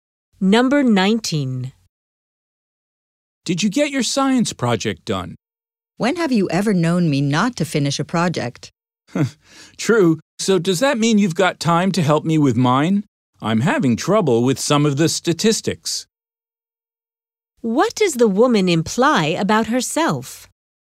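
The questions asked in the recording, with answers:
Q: What does the woman imply about herself?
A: She always finishes her projects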